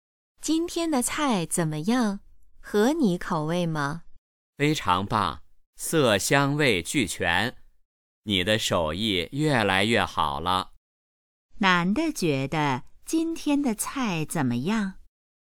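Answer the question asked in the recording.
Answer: 非常好吃,色香味俱全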